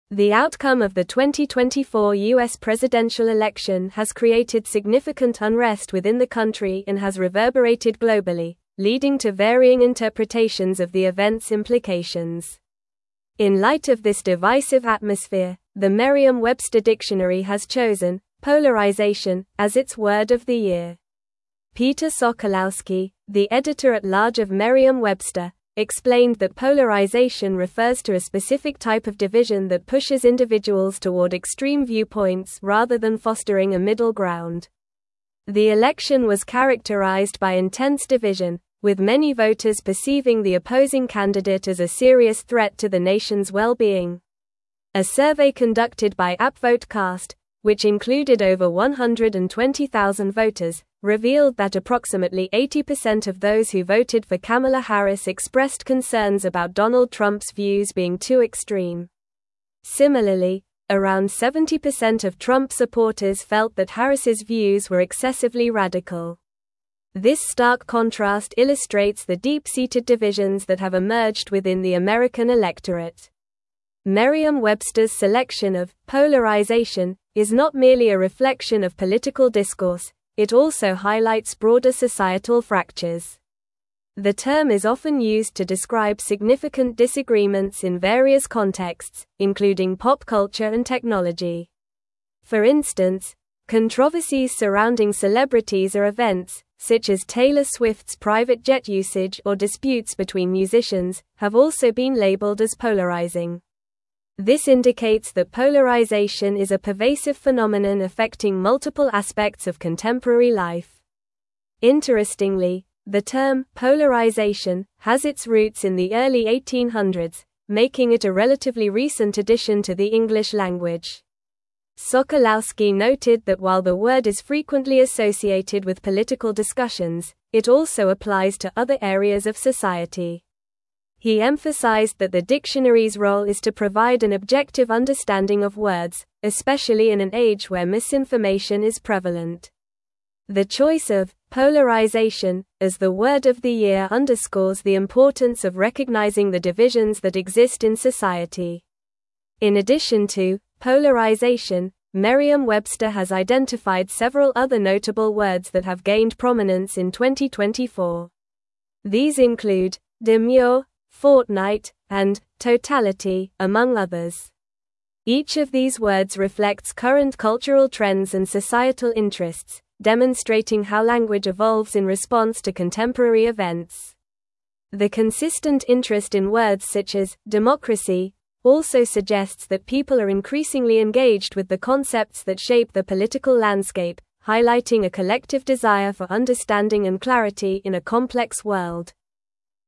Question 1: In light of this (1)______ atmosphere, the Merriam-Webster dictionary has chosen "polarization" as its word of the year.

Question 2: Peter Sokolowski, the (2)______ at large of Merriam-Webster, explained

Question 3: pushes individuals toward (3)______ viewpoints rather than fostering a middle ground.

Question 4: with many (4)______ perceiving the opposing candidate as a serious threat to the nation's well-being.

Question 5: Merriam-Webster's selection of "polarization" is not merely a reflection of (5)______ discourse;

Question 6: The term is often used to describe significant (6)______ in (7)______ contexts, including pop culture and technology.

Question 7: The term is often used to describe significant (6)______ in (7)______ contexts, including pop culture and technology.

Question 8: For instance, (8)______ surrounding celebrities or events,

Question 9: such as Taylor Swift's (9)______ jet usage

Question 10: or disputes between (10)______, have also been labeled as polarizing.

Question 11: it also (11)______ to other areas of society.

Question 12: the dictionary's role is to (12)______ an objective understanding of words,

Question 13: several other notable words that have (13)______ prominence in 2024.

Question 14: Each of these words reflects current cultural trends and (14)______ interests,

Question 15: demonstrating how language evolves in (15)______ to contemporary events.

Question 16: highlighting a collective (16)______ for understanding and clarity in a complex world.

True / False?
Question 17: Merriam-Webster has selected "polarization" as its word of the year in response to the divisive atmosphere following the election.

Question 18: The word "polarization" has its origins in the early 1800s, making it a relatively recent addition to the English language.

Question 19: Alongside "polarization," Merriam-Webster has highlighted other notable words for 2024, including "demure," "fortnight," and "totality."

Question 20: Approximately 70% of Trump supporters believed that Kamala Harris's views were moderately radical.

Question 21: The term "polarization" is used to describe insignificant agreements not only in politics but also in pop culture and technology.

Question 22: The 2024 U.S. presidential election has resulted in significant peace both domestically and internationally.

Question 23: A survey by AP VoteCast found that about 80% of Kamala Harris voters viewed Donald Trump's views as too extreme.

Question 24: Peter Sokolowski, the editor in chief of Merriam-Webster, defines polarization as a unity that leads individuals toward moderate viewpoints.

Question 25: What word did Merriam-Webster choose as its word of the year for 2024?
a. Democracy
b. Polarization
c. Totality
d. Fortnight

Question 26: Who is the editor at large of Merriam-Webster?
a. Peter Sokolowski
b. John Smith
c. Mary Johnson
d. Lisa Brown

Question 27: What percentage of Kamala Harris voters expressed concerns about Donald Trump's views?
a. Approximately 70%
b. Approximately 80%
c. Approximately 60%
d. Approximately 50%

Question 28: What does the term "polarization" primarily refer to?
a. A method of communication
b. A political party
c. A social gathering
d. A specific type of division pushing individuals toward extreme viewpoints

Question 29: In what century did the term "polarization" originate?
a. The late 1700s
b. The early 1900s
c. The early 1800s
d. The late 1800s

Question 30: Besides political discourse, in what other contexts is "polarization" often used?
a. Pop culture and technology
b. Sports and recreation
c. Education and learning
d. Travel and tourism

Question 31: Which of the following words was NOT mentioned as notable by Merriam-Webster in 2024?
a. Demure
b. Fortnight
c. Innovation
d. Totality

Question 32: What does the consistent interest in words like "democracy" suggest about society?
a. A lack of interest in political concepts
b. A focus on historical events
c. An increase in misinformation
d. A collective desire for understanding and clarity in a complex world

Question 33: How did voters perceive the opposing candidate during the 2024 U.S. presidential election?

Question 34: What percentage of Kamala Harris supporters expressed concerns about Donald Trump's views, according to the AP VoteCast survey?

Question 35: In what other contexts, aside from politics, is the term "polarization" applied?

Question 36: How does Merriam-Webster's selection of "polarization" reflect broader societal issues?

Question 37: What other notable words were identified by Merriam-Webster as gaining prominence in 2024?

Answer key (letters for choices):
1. divisive
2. editor
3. extreme
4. voters
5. political
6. disagreements
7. various
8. controversies
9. private
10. musicians
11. applies
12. provide
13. gained
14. societal
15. response
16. desire
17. True
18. True
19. True
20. False
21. False
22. False
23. True
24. False
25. b
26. a
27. b
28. d
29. c
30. a
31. c
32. d
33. Many voters perceived the opposing candidate as a serious threat to the nation's well-being.
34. Approximately 80% of those who voted for Kamala Harris expressed concerns about Donald Trump's views being too extreme.
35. The term "polarization" is also applied in contexts such as pop culture and technology, including controversies surrounding celebrities or events.
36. The selection of "polarization" highlights broader societal fractures and the significant disagreements that exist in various aspects of life.
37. Other notable words identified include "demure," "fortnight," and "totality," among others.

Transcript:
The outcome of the 2024 U.S. presidential election has created significant unrest within the country and has reverberated globally, leading to varying interpretations of the event's implications. In light of this divisive atmosphere, the Merriam-Webster dictionary has chosen "polarization" as its word of the year. Peter Sokolowski, the editor at large of Merriam-Webster, explained that polarization refers to a specific type of division that pushes individuals toward extreme viewpoints rather than fostering a middle ground.
The election was characterized by intense division, with many voters perceiving the opposing candidate as a serious threat to the nation's well-being. A survey conducted by AP VoteCast, which included over 120,000 voters, revealed that approximately 80% of those who voted for Kamala Harris expressed concerns about Donald Trump's views being too extreme. Similarly, around 70% of Trump supporters felt that Harris's views were excessively radical. This stark contrast illustrates the deep-seated divisions that have emerged within the American electorate.
Merriam-Webster's selection of "polarization" is not merely a reflection of political discourse; it also highlights broader societal fractures. The term is often used to describe significant disagreements in various contexts, including pop culture and technology. For instance, controversies surrounding celebrities or events, such as Taylor Swift's private jet usage or disputes between musicians, have also been labeled as polarizing. This indicates that polarization is a pervasive phenomenon affecting multiple aspects of contemporary life.
Interestingly, the term "polarization" has its roots in the early 1800s, making it a relatively recent addition to the English language. Sokolowski noted that while the word is frequently associated with political discussions, it also applies to other areas of society. He emphasized that the dictionary's role is to provide an objective understanding of words, especially in an age where misinformation is prevalent. The choice of "polarization" as the word of the year underscores the importance of recognizing the divisions that exist in society.
In addition to "polarization," Merriam-Webster has identified several other notable words that have gained prominence in 2024. These include "demure," "fortnight," and "totality," among others. Each of these words reflects current cultural trends and societal interests, demonstrating how language evolves in response to contemporary events. The consistent interest in words such as "democracy" also suggests that people are increasingly engaged with the concepts that shape their political landscape, highlighting a collective desire for understanding and clarity in a complex world.

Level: Level 4